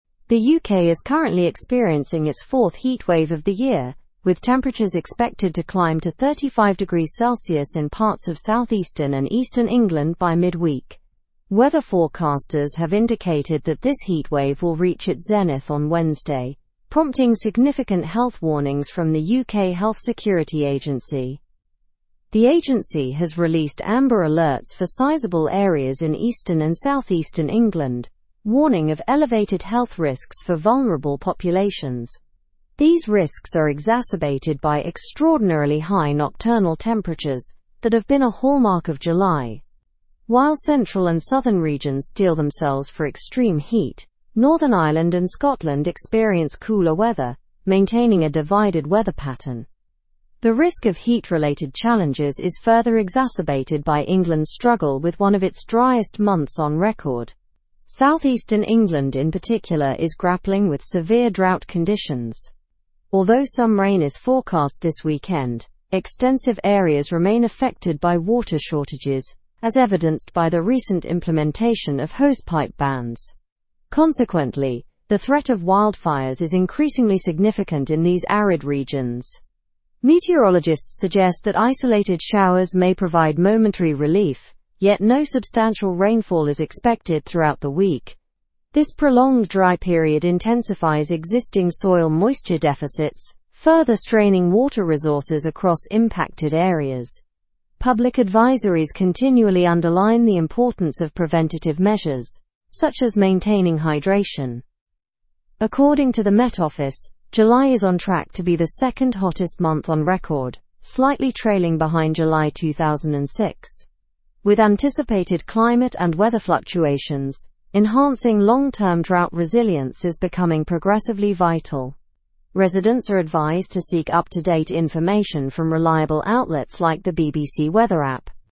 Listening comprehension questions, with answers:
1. What temperature is expected in southeastern England during the heatwave?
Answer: 35°C.

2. What has the UK Health Security Agency issued for parts of England?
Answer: Amber alerts.

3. Which areas remain cooler in the current weather pattern?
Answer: Northern Ireland and Scotland.

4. What environmental issue is southeastern England facing?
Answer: Severe drought conditions.

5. What is exacerbating heat-related challenges in the UK?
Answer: One of the driest months on record.

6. What significant threat do dry regions face?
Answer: The threat of wildfires.

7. What is July on track to become according to the Met Office?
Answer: The second hottest month on record.

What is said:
The UK is currently experiencing its fourth heatwave of the year, with temperatures expected to climb to 35°C in parts of southeastern and eastern England by midweek. Weather forecasters have indicated that this heatwave will reach its zenith on Wednesday, prompting significant health warnings from the UK Health Security Agency.
The Agency has released amber alerts for sizable areas in eastern and southeastern England, warning of elevated health risks for vulnerable populations. These risks are exacerbated by extraordinarily high nocturnal temperatures that have been a hallmark of July. While central and southern regions steel themselves for extreme heat, Northern Ireland and Scotland experience cooler weather, maintaining a divided weather pattern.
The risk of heat-related challenges is further exacerbated by England's struggle with one of its driest months on record. Southeastern England, in particular, is grappling with severe drought conditions. Although some rain is forecast this weekend, extensive areas remain affected by water shortages, as evidenced by the recent implementation of hosepipe bans. Consequently, the threat of wildfires is increasingly significant in these arid regions.
Meteorologists suggest that isolated showers may provide momentary relief, yet no substantial rainfall is expected throughout the week. This prolonged dry period intensifies existing soil moisture deficits, further straining water resources across impacted areas. Public advisories continually underline the importance of preventative measures, such as maintaining hydration.
According to the Met Office, July is on track to be the second hottest month on record, slightly trailing behind July 2006.
Show model answerThe second hottest month on record.
to be the second hottest month on record, slightly trailing behind July 2006. With ? climate and weather fluctuations, enhancing long-term drought resilience is becoming progressively vital. Residents are advised to seek up-to-date information from reliable outlets like the BBC Weather app.

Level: Level 4